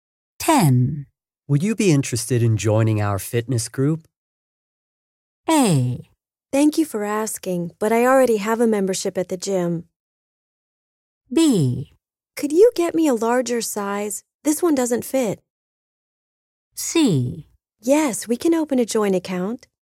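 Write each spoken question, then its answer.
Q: Would you be interested in joining our fitness group?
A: A: Thank you for asking, but I already have a membership at the gym.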